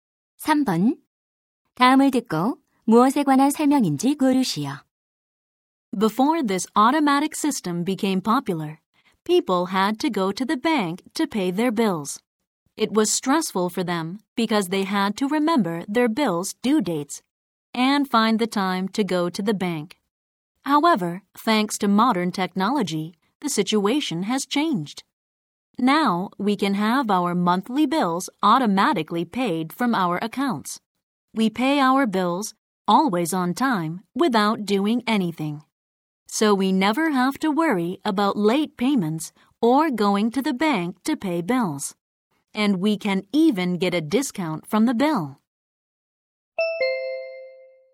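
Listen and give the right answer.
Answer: 자동이체(공과금 자동 납부)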